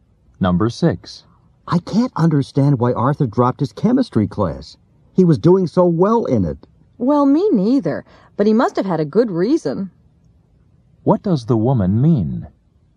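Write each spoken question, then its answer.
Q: What does the woman mean?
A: She doesn't understand either, but Arthur must have had a good reason.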